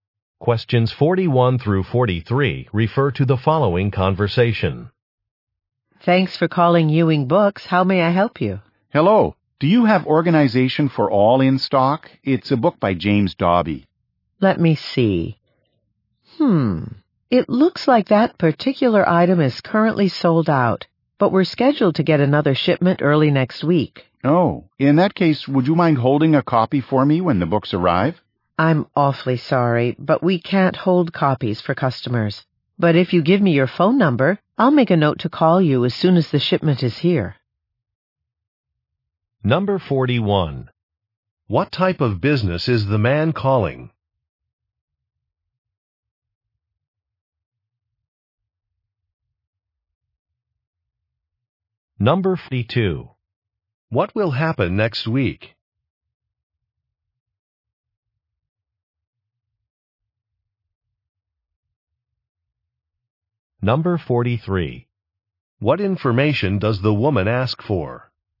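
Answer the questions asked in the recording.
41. A bookstore
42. A shipment of books will arrive
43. His phone number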